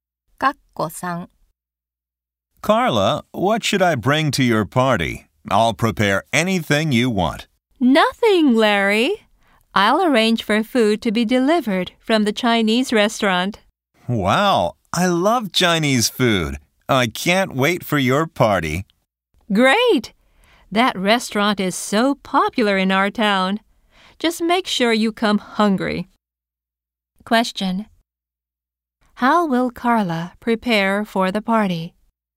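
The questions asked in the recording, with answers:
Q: How will Carla prepare for the party?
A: She will have food delivered from a Chinese restaurant.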